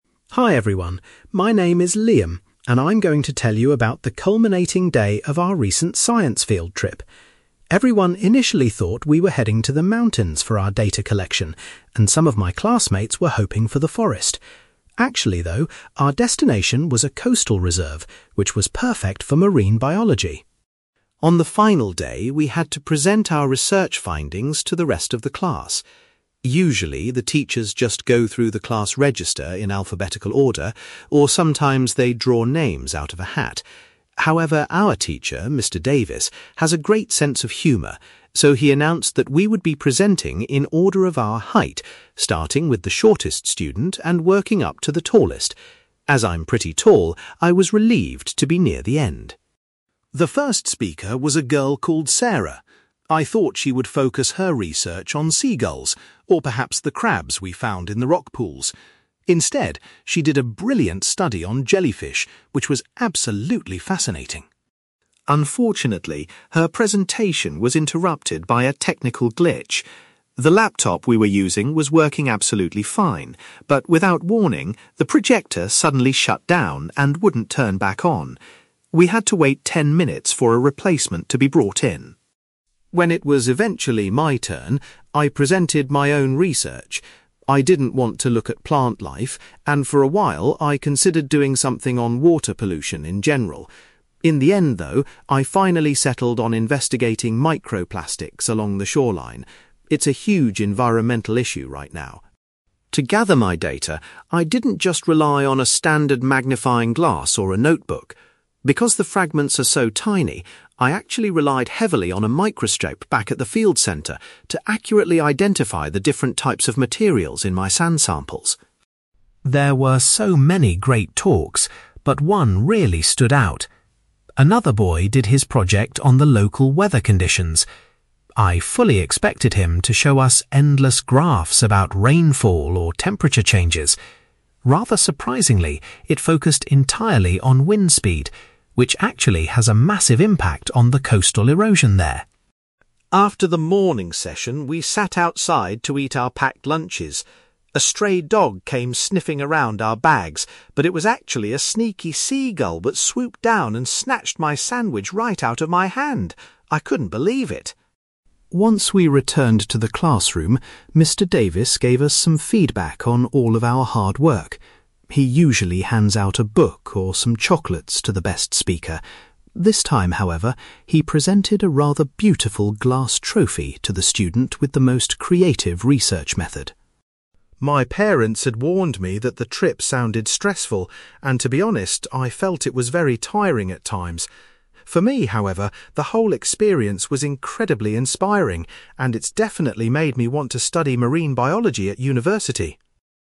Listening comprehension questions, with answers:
You will hear a boy called Liam talking about a science field trip and the day the students delivered their research presentations. For questions 9-18, complete the sentences with a word or short phrase.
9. Liam says that instead of the mountains or a forest, the students visited a (9)........................... for their field trip.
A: coastal reserve

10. Liam was surprised that the sequence of speakers was determined by their (10)........................... .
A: height

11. The first student's research project was entirely focused on (11)........................... rather than other local wildlife.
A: jellyfish

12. The presentations were temporarily halted when the (12)........................... stopped functioning properly.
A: projector

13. Liam decided to carry out his own investigation into the presence of (13)........................... .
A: microplastics

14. Liam explains that he needed a (14)........................... in order to examine his collected samples closely.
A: microscope

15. Liam was particularly impressed by a presentation that measured (15)........................... in the area.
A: wind speed

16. During the lunch break, Liam's meal was stolen by a (16)........................... .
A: seagull

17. The teacher awarded a (17)........................... to the student with the most imaginative project.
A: glass trophy

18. Looking back on the field trip, Liam describes the culminating day as (18)........................... .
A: inspiring

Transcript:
Liam: Hi everyone. My name is Liam, and I'm going to tell you about the culminating day of our recent science field trip. Everyone initially thought we were heading to the mountains for our data collection, and some of my classmates were hoping for the forest. Actually, though, our destination was a coastal reserve, which was perfect for marine biology.
On the final day, we had to present our research findings to the rest of the class. Usually, the teachers just go through the class register in alphabetical order, or sometimes they draw names out of a hat. However, our teacher, Mr Davis, has a great sense of humour, so he announced that we would be presenting in order of our height, starting with the shortest student and working up to the tallest. As I'm pretty tall, I was relieved to be near the end!
The first speaker was a girl called Sarah. I thought she would focus her research on seagulls or perhaps the crabs we found in the rock pools. Instead, she did a brilliant study on jellyfish, which was absolutely fascinating.
Unfortunately, her presentation was interrupted by a technical glitch. The laptop we were using was working absolutely fine, but without warning, the projector suddenly shut down and wouldn't turn back on. We had to wait ten minutes for a replacement to be brought in.
When it was eventually my turn, I presented my own research. I didn't want to look at plant life, and for a while, I considered doing something on water pollution in general. In the end, though, I finally settled on investigating microplastics along the shoreline. It's a huge environmental issue right now.
To gather my data, I didn't just rely on a standard magnifying glass or a notebook. Because the fragments are so tiny, I actually relied heavily on a microscope back at the field centre to accurately identify the different types of materials in my sand samples.
There were so many great talks, but one really stood out. Another boy did his project on the local weather conditions. I fully expected him to show us endless graphs about rainfall or temperature changes. Rather surprisingly, it focused entirely on wind speed, which actually has a massive impact on the coastal erosion there.
After the morning session, we sat outside to eat our packed lunches. A stray dog came sniffing around our bags, but it was actually a sneaky seagull that swooped down and snatched my sandwich right out of my hand! I couldn't believe it.
Once we returned to the classroom, Mr Davis gave us some feedback on all of our hard work. He usually hands out a book or some chocolates to the best speaker. This time, however, he presented a rather beautiful glass trophy to the student with the most creative research method.
My parents had warned me that the trip sounded stressful, and to be honest, I felt it was very tiring at times. For me, however, the whole experience was incredibly inspiring, and it's definitely made me want to study marine biology at university.

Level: B2